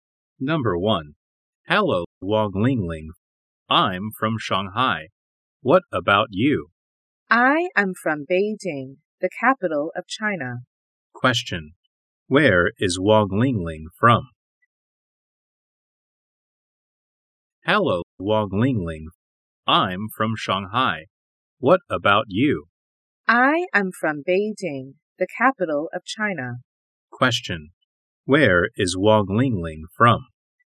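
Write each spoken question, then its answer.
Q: Where is Wang Lingling from?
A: Beijing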